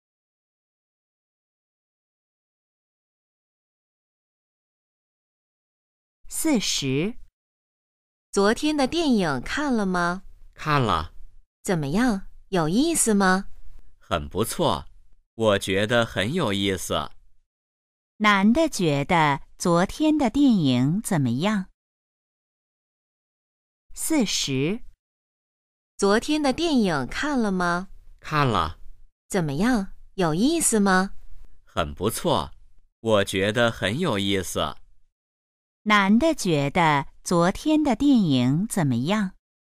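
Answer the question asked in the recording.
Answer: 很有意思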